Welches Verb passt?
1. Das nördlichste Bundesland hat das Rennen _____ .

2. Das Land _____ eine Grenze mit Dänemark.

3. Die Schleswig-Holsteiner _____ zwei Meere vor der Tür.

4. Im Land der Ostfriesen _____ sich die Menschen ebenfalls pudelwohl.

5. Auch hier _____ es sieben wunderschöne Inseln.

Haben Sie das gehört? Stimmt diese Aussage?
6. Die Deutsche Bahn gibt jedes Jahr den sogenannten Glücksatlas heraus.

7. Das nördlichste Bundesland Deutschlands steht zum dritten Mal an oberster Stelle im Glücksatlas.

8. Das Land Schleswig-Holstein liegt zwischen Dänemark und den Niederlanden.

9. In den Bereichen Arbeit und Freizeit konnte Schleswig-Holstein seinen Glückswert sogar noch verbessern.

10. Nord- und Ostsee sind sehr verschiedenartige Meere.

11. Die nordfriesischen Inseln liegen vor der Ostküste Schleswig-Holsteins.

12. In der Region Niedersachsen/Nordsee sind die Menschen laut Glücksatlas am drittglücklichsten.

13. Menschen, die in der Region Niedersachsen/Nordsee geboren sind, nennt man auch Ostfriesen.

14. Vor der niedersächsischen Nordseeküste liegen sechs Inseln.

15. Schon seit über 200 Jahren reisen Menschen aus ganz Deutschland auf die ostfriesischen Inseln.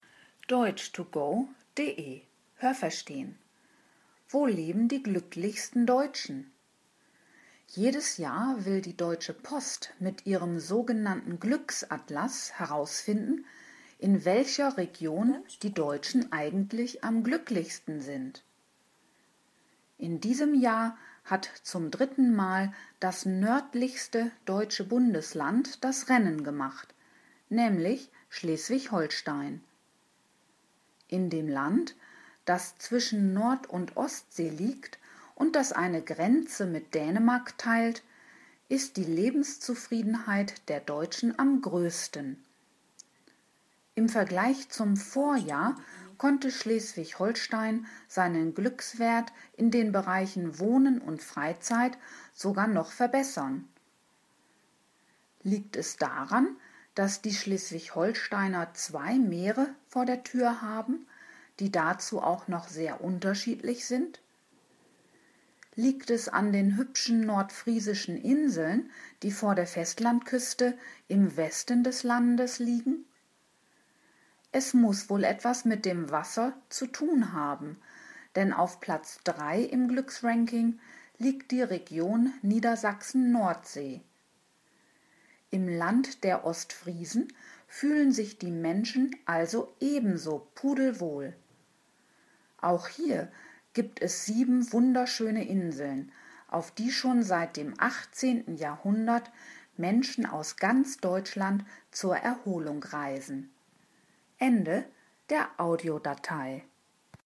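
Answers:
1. gemacht
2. teilt
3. haben
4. fühlen
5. gibt
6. falsch
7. richtig
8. falsch
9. falsch
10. richtig
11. falsch
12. richtig
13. richtig
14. falsch
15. richtig

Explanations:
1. Der Ausdruck „das Rennen machen" ist eine Redewendung und bedeutet so viel wie ‚gewinnen'.
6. Es ist die Deutsche Post.
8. Es liegt zwischen Nord- und Ostsee, hat aber eine Grenze zu Dänemark.
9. Es sind die Bereiche Wohnen und Freizeit.
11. Sie liegen im Westen des Landes.

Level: B (mittel)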